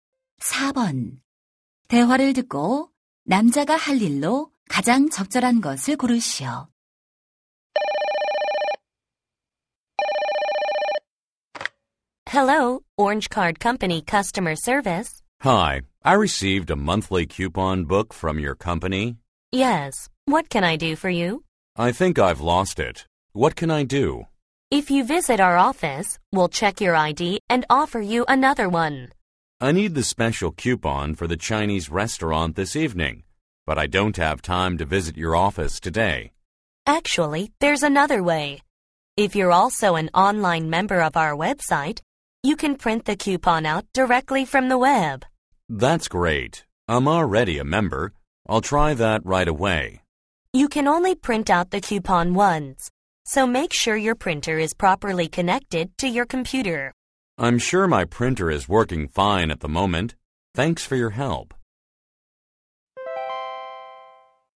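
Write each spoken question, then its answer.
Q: 대화를 듣고 남자가 할 일로 가장 적절한 것을 고르시오.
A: 웹사이트에서 쿠폰을 출력한다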